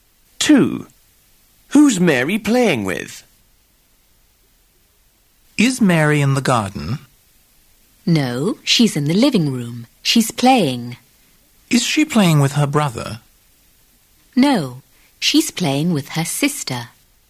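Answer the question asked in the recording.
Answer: Her sister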